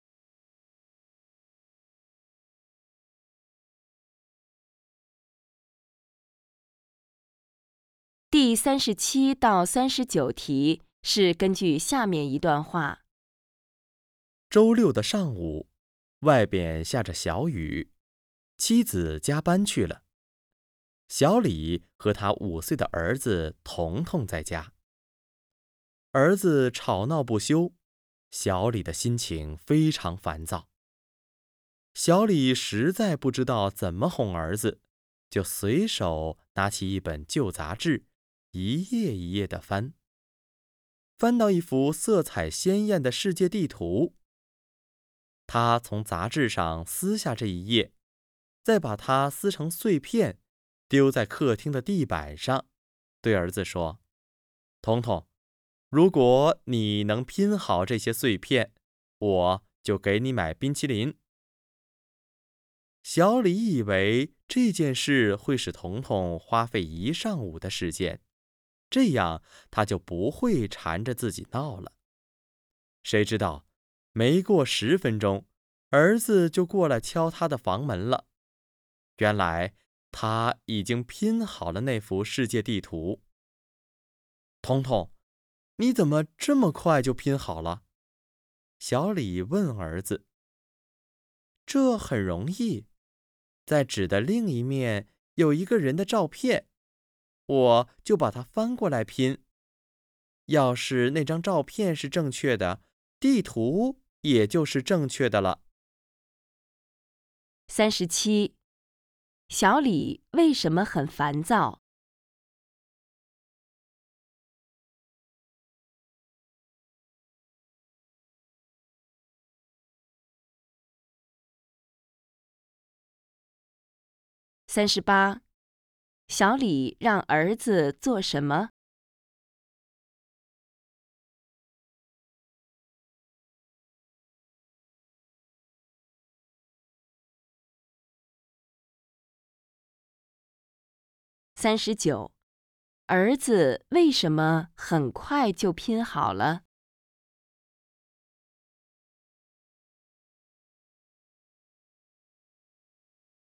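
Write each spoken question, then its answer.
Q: 小李为什么很烦躁?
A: 儿子吵闹不休

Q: 小李让儿子做什么?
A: 拼好撕碎的世界地图

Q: 儿子为什么很快就拼好了?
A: 纸的背面有一个人的照片,他按照片拼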